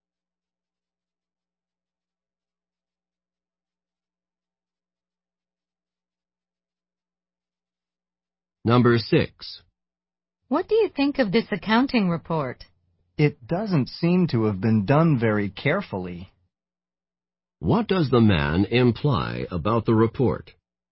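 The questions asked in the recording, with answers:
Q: What does the man imply about the report?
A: It was done carelessly.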